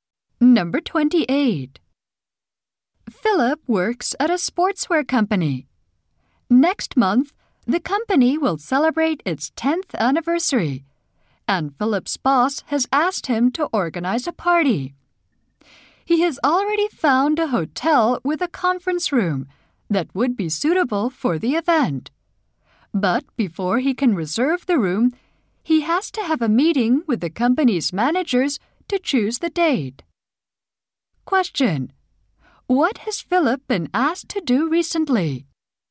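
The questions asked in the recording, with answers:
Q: What has Philip been asked to do recently?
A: Organize the company's 10th anniversary party.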